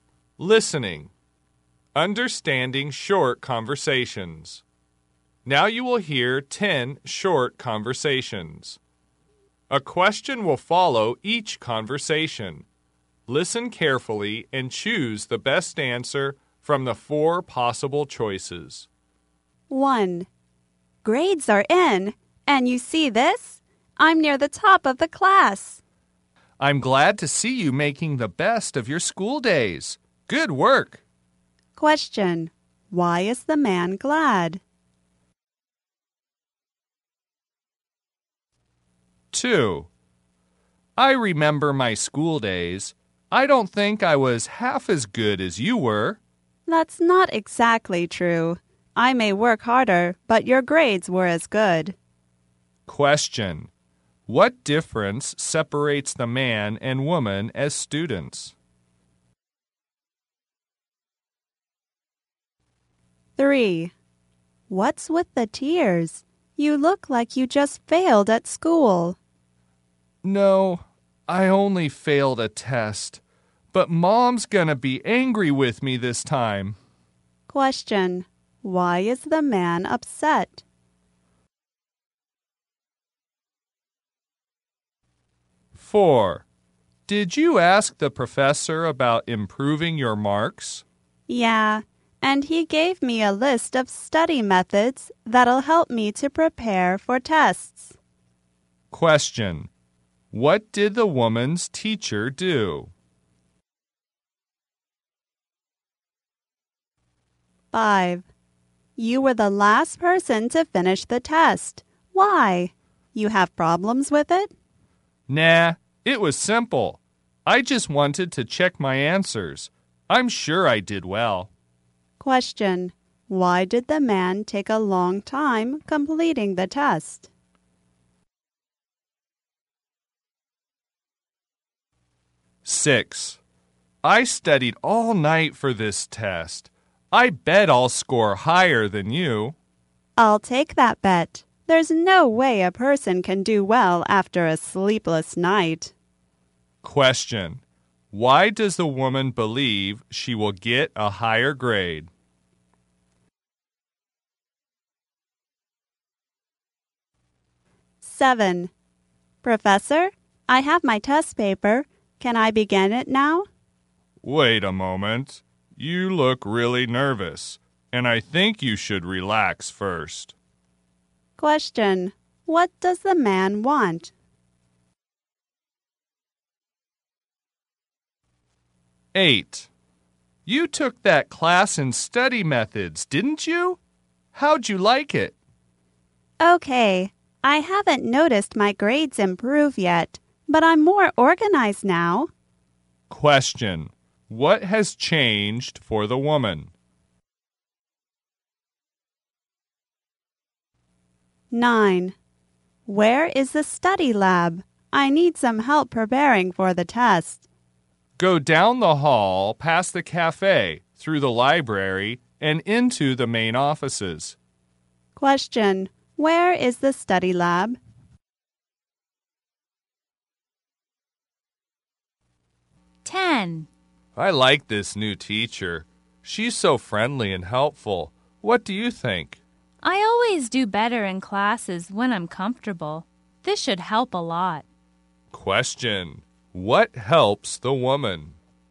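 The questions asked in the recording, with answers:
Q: Why is the man glad?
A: The woman is near the top of the class.

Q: Why is the man upset?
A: He failed a test and his mom will be angry.

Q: What did the woman's teacher do?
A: He gave her a list of study methods.

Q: Why did the man take a long time completing the test?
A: He wanted to check his answers.

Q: Why does the woman believe she will get a higher grade?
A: No one can do well after a sleepless night.

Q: What does the man want?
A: To begin the test now.

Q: What has changed for the woman?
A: She is more organized now.

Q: Where is the study lab?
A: In the main offices, past the cafe and through the library.

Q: What helps the woman?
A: Being comfortable in class, with a friendly teacher.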